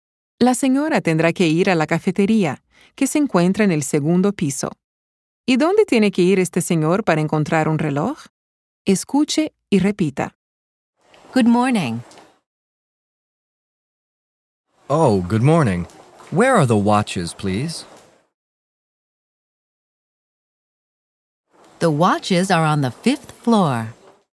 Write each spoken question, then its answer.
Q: ¿Y dónde tiene que ir este señor para encontrar un reloj?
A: El señor tiene que ir al quinto piso para encontrar un reloj.